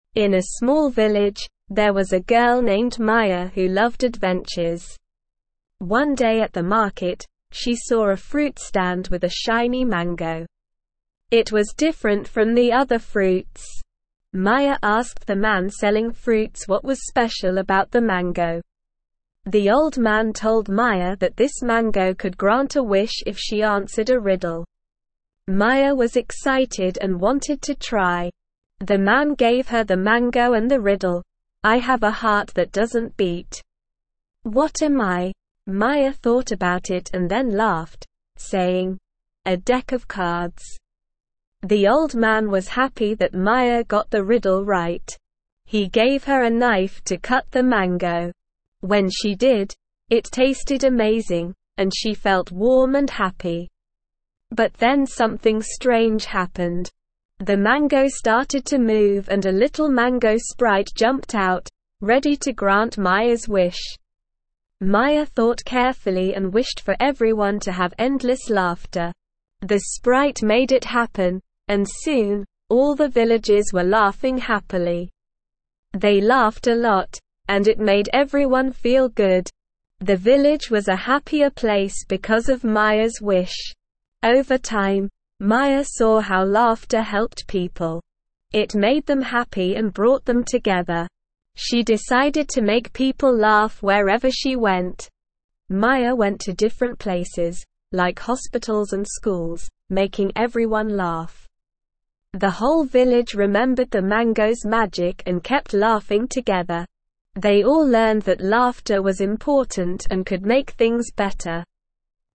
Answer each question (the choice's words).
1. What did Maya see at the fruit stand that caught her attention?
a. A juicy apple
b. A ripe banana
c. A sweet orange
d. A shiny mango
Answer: A shiny mango

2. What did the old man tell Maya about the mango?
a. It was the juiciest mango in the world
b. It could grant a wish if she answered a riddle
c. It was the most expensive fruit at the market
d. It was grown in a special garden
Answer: It could grant a wish if she answered a riddle

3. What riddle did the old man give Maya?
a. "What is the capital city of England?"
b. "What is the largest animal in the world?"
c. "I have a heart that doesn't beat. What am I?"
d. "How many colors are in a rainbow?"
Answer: "I have a heart that doesn't beat. What am I?"

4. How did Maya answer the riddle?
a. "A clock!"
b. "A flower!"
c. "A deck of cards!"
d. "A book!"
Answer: "A deck of cards!"

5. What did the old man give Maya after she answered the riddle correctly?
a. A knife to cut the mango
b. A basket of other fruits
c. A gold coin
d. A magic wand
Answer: A knife to cut the mango

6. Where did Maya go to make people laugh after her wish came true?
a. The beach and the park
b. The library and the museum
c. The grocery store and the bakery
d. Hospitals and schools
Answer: Hospitals and schools

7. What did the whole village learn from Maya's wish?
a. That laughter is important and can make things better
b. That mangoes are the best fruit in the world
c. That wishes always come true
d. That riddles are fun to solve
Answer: That laughter is important and can make things better

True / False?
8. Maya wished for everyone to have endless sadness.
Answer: False

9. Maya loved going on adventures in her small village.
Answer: True

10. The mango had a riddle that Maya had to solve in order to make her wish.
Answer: True

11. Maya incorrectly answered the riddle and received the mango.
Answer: False

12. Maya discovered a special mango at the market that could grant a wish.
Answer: True

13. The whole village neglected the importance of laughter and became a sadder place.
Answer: False

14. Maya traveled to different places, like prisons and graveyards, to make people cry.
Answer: False

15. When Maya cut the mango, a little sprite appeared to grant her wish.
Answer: True

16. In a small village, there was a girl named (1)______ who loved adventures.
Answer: Maya

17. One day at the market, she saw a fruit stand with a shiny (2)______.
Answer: mango

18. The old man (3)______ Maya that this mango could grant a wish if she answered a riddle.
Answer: told

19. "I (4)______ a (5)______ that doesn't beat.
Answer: have

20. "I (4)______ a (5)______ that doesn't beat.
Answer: heart

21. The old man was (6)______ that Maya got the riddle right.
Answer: happy

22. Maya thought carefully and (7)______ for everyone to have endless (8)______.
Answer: wished

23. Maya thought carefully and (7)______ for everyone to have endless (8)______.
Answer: laughter

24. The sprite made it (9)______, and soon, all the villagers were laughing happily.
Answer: happen

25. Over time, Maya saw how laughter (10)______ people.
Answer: helped

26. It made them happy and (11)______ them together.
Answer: brought

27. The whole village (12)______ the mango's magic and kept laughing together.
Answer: remembered

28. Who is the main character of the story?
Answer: Maya is the main character of the story.

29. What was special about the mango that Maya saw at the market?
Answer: The mango could grant a wish if Maya answered a riddle.

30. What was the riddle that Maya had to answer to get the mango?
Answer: The riddle was "I have a heart that doesn't beat. What am I?" The answer was a deck of cards.

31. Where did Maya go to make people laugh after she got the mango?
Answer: Maya went to different places like hospitals and schools to make people laugh.

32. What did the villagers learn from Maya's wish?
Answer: The villagers learned that laughter was important and could make things better.

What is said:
In a small village, there was a girl named Maya who loved adventures. One day at the market, she saw a fruit stand with a shiny mango. It was different from the other fruits. Maya asked the man selling fruits what was special about the mango.
The old man told Maya that this mango could grant a wish if she answered a riddle. Maya was excited and wanted to try. The man gave her the mango and the riddle, "I have a heart that doesn't beat. What am I?" Maya thought about it and then laughed, saying, "A deck of cards!"
The old man was happy that Maya got the riddle right. He gave her a knife to cut the mango. When she did, it tasted amazing, and she felt warm and happy. But then something strange happened. The mango started to move and a little mango sprite jumped out, ready to grant Maya's wish.
Maya thought carefully and wished for everyone to have endless laughter. The sprite made it happen, and soon, all the villagers were laughing happily. They laughed a lot, and it made everyone feel good. The village was a happier place because of Maya's wish.
Over time, Maya saw how laughter helped people. It made them happy and brought them together. She decided to make people laugh wherever she went. Maya went to different places, like hospitals and schools, making everyone laugh. The whole village remembered the mango's magic and kept laughing together. They all learned that laughter was important and could make things better.

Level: Level 2